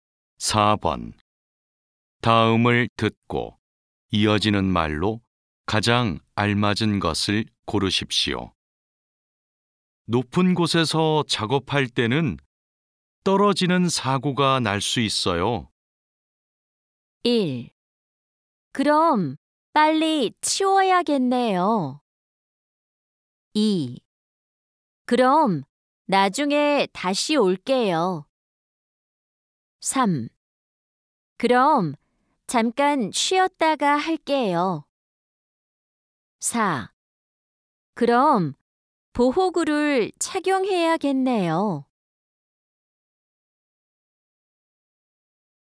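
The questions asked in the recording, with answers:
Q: 다음을 듣고 이어지는 말로 가장 알맞은 것을 고르십시오.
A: 4: 그럼 보호구를 착용해야겠네요.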